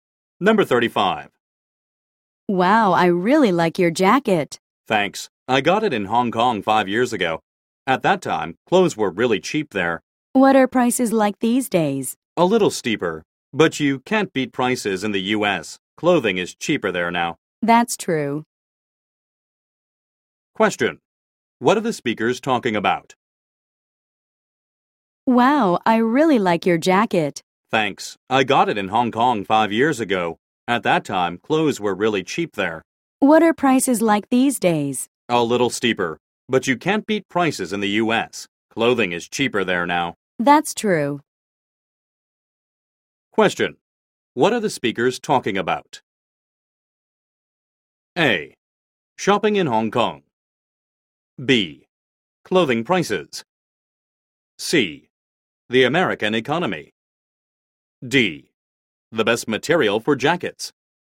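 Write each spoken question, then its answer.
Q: What are the speakers talking about?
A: B: Clothing prices.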